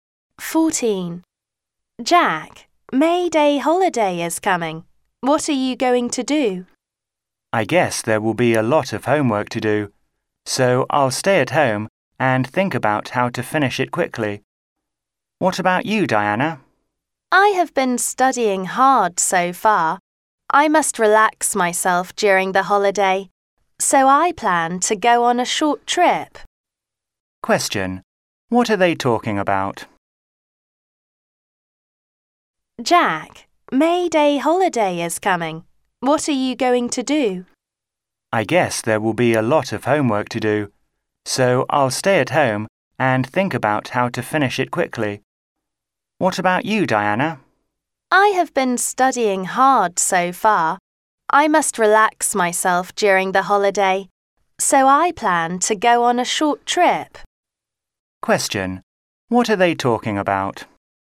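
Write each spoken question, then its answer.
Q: Question. What are they talking about?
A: Their plans for the May Day holiday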